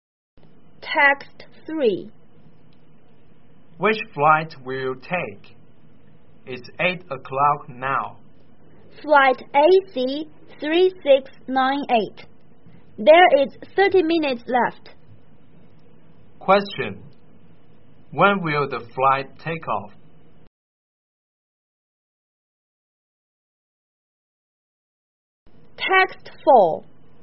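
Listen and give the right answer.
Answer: At 8:30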